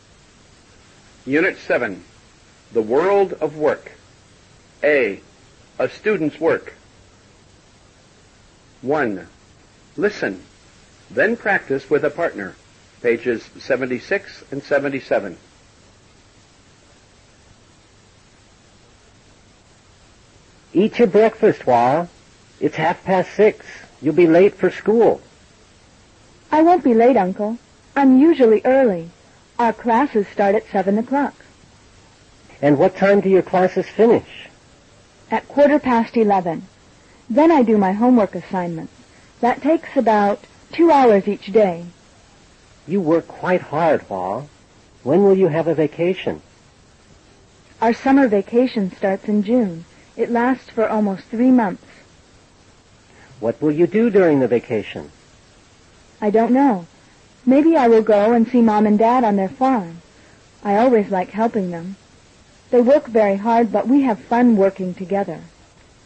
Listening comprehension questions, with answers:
Now answer. (Bây giờ trả lời câu hỏi.)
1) What time do Hoa's class start?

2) What time do they finish?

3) For how many hours a day does Hoa do her homework?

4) What will Hoa do during her vacation?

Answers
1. Her class starts at 7 o'clock.
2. They finish at a quarter past eleven.
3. Hoa does her homework two hours a day.
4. Hoa will help her parents on their farm.

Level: Lớp 7